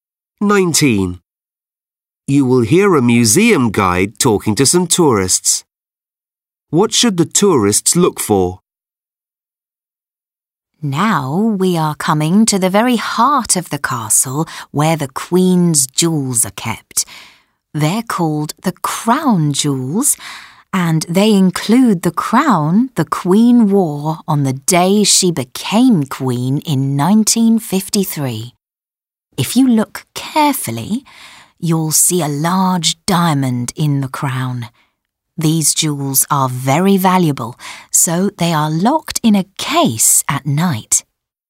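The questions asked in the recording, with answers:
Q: What should the tourists look for?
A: A large diamond in the crown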